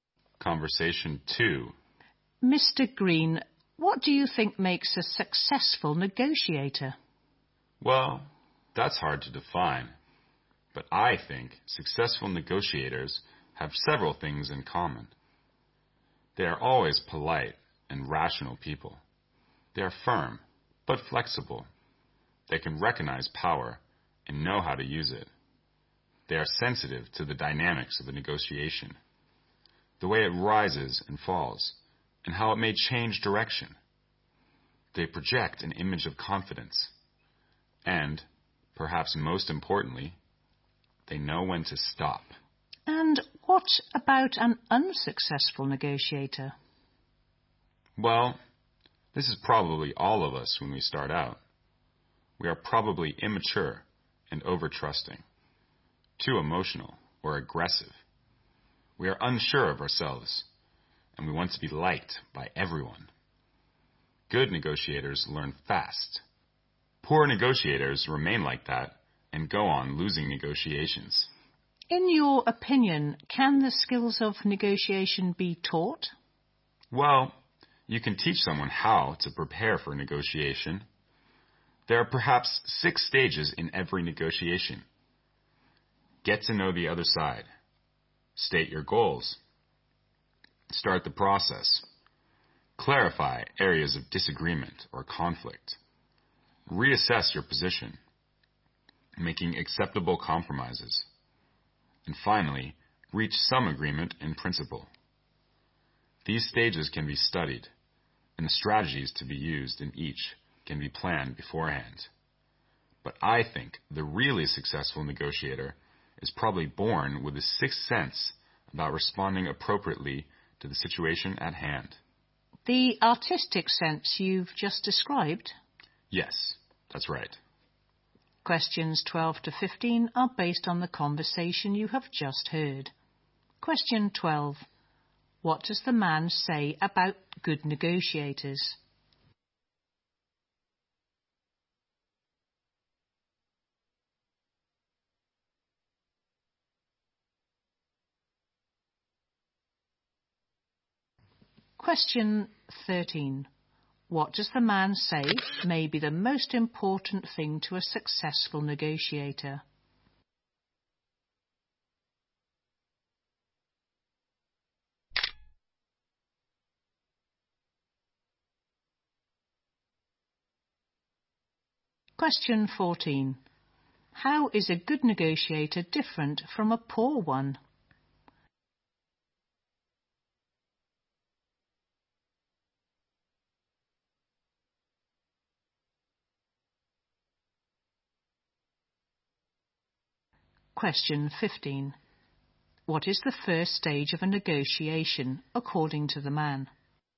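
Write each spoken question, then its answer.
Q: What does the man say about good negotiators?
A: They are polite and rational, and firm but flexible

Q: What does the man say may be the most important thing to a successful negotiator?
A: Knowing when to stop

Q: How is a good negotiator different from a poor one?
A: A good negotiator learns fast

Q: What is the first stage of a negotiation, according to the man?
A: Getting to know the other side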